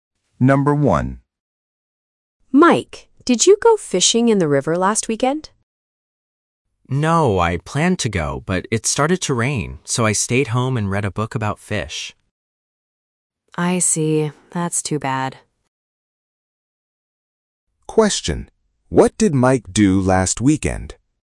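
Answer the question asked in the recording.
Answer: He stayed home and read a book about fish.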